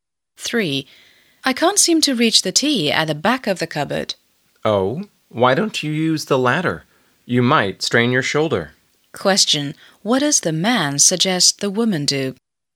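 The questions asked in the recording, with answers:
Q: What does the man suggest the woman do?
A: Use the ladder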